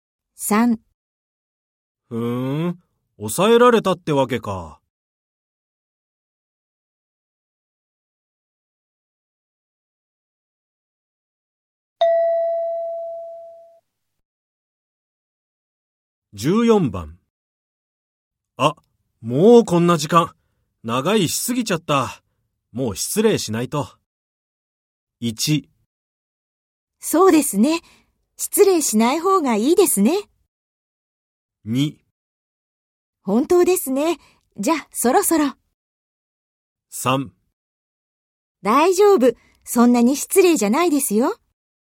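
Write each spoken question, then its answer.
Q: 長いしすぎちゃった。もう失礼しないと。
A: 2: 本当ですね。じゃあ、そろそろ。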